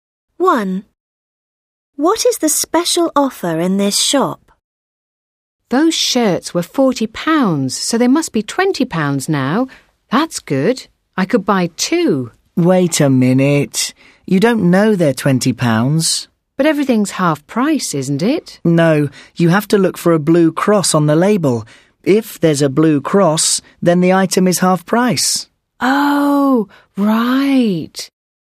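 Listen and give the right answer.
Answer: Items with a blue cross on the label are half price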